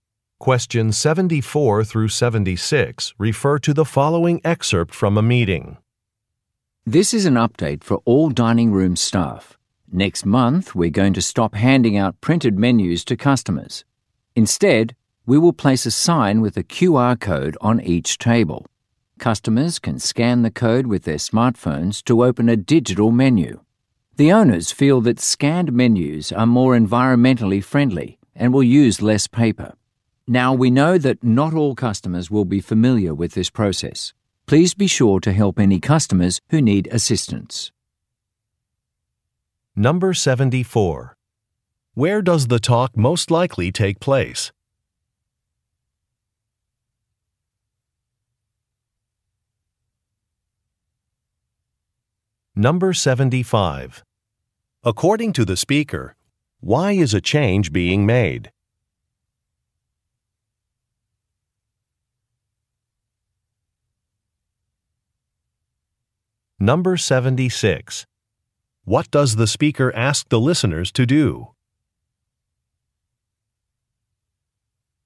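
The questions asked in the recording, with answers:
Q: Where does the talk most likely take place?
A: At a restaurant

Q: According to the speaker, why is a change being made?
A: To be more environmentally friendly and use less paper

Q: What does the speaker ask the listeners to do?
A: Help customers who need assistance with the QR code menus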